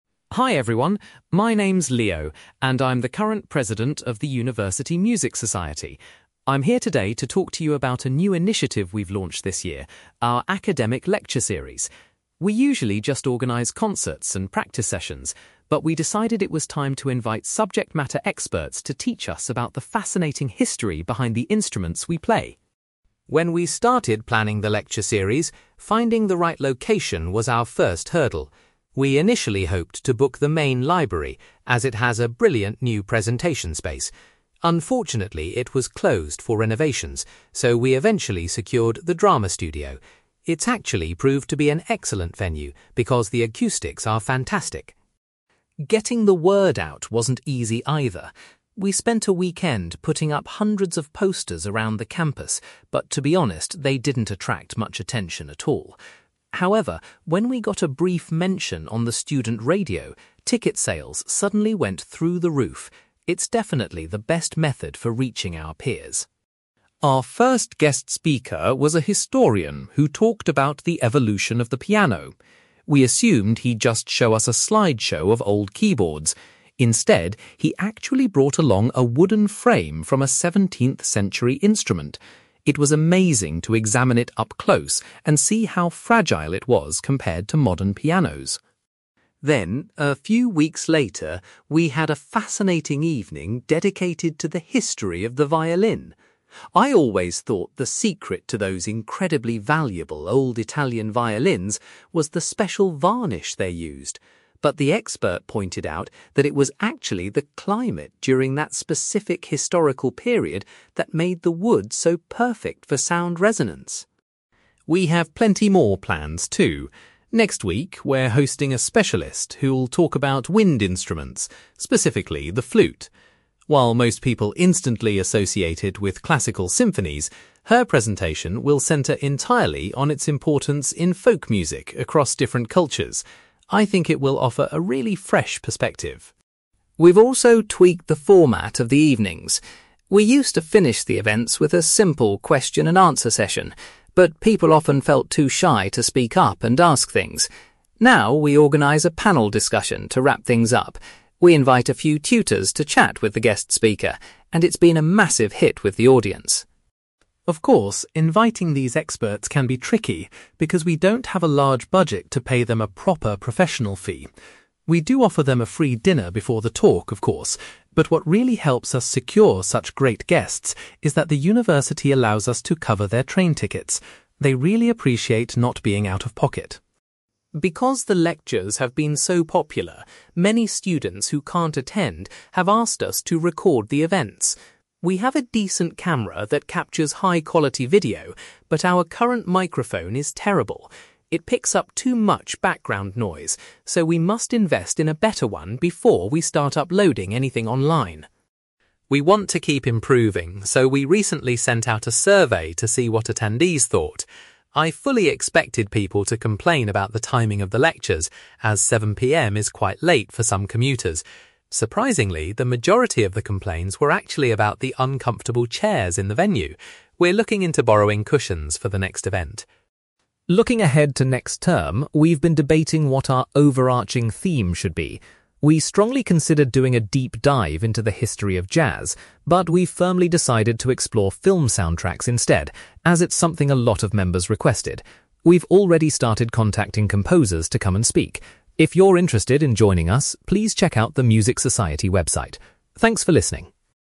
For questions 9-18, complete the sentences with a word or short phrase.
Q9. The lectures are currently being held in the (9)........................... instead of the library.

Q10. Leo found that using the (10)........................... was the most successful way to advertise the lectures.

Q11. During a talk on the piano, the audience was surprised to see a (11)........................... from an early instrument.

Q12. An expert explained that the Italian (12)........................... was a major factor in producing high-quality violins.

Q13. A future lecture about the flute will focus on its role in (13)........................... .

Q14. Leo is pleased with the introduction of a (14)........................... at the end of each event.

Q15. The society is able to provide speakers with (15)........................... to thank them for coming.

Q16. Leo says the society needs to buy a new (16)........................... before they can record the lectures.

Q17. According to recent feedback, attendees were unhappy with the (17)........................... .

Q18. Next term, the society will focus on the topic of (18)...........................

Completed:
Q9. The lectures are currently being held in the drama studio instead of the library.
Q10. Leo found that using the student radio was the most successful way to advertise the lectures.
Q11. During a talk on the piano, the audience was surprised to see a wooden frame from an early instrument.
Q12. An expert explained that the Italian climate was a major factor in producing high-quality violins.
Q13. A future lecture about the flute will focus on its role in folk music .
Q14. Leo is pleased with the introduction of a panel discussion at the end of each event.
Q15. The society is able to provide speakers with train tickets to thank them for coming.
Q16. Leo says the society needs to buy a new microphone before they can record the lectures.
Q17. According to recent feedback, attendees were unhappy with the uncomfortable chairs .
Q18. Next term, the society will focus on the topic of film soundtracks

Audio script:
Leo: Hi everyone, my name is Leo, and I'm the current president of the university Music Society. I'm here today to talk to you about a new initiative we've launched this year: our academic lecture series. We usually just organise concerts and practice sessions, but we decided it was time to invite subject-matter experts to teach us about the fascinating history behind the instruments we play.
When we started planning the lecture series, finding the right location was our first hurdle. We initially hoped to book the main library, as it has a brilliant new presentation space. Unfortunately, it was closed for renovations, so we eventually secured the drama studio. It's actually proved to be an excellent venue because the acoustics are fantastic.
Getting the word out wasn't easy, either. We spent a weekend putting up hundreds of posters around the campus, but to be honest, they didn't attract much attention at all. However, when we got a brief mention on the student radio, ticket sales suddenly went through the roof. It's definitely the best method for reaching our peers.
Our first guest speaker was a historian who talked about the evolution of the piano. We assumed he'd just show us a slideshow of old keyboards. Instead, he actually brought along a wooden frame from a 17th-century instrument. It was amazing to examine it up close and see how fragile it was compared to modern pianos.
Then, a few weeks later, we had a fascinating evening dedicated to the history of the violin. I always thought the secret to those incredibly valuable old Italian violins was the special varnish they used. But the expert pointed out that it was actually the climate during that specific historical period that made the wood so perfect for sound resonance.
We have plenty more planned, too. Next week, we're hosting a specialist who'll talk about wind instruments, specifically the flute. While most people instantly associate it with classical symphonies, her presentation will center entirely on its importance in folk music across different cultures. I think it will offer a really fresh perspective.
We've also tweaked the format of the evenings. We used to finish the events with a simple question and answer session, but people often felt too shy to speak up and ask things. Now, we organise a panel discussion to wrap things up. We invite a few tutors to chat with the guest speaker, and it's been a massive hit with the audience.
Of course, inviting these experts can be tricky because we don't have a large budget to pay them a proper professional fee. We do offer them a free dinner before the talk, of course, but what really helps us secure such great guests is that the university allows us to cover their train tickets. They really appreciate not being out of pocket.
Because the lectures have been so popular, many students who can't attend have asked us to record the events. We have a decent camera that captures high-quality video, but our current microphone is terrible. It picks up too much background noise, so we must invest in a better one before we start uploading anything online.
We want to keep improving, so we recently sent out a survey to see what attendees thought. I fully expected people to complain about the timing of the lectures, as 7 PM is quite late for some commuters. Surprisingly, the majority of the complaints were actually about the uncomfortable chairs in the venue. We're looking into borrowing cushions for the next event!
Looking ahead to next term, we've been debating what our overarching theme should be. We strongly considered doing a deep dive into the history of jazz, but we've firmly decided to explore film soundtracks instead, as it's something a lot of members requested. We've already started contacting composers to come and speak. If you're interested in joining us, please check out the Music Society website. Thanks for listening!

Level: B2